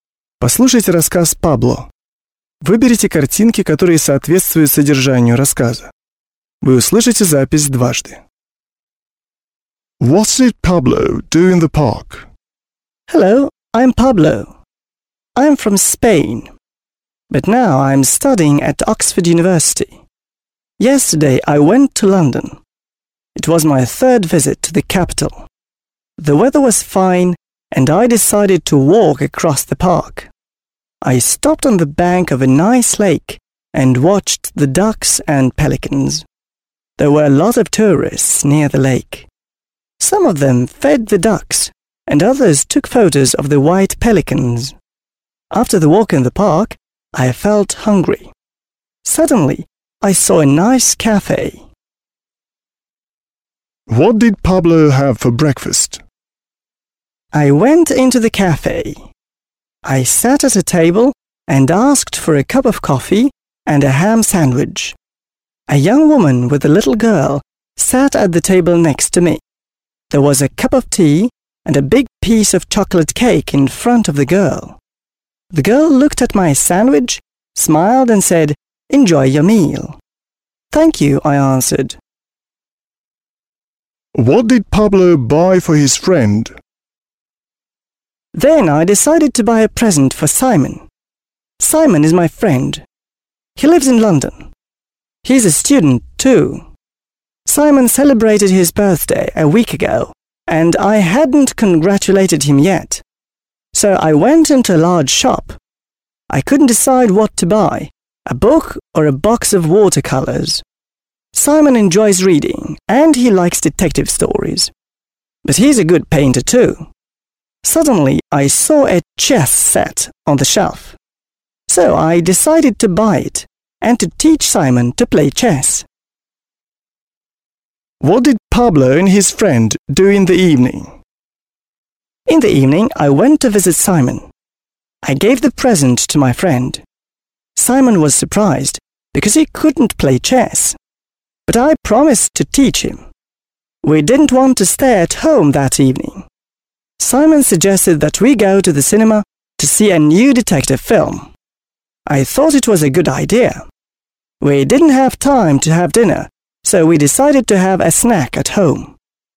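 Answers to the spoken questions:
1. He walked across the park and watched the ducks and pelicans on the lake.
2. A cup of coffee and a ham sandwich.
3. A chess set.
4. They went to the cinema to see a new detective film.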